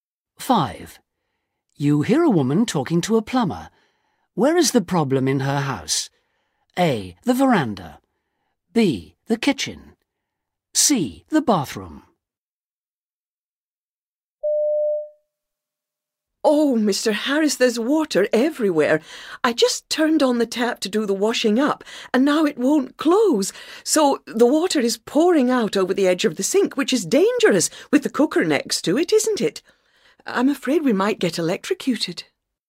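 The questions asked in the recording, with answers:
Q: Where is the problem in her house?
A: B: The kitchen.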